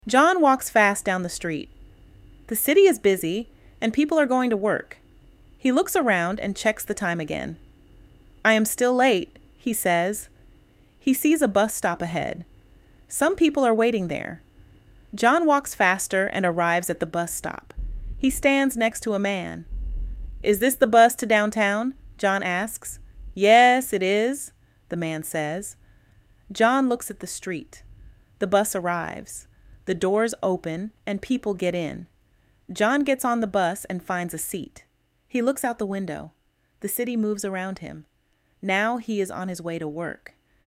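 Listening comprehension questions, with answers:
Responda em inglês:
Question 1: Where is John going?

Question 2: Is he late?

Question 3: What does he see?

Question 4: What does he ask?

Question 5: Where does he sit?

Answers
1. He is going to work (downtown).
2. Yes, he is still late.
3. He sees a bus stop ahead.
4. Is this the bus to downtown?
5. On a seat on the bus.

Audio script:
John walks fast down the street. The city is busy, and people are going to work.
He looks around and checks the time again.
"I am still late," he says.
He sees a bus stop ahead.
Some people are waiting there.
John walks faster and arrives at the bus stop.
He stands next to a man.
"Is this the bus to downtown?" John asks.
"Yes, it is," the man says.
John looks at the street.
The bus arrives.
The doors open, and people get in.
John gets on the bus and finds a seat.
He looks out the window.
The city moves around him.
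Now he is on his way to work.

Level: Inglês Básico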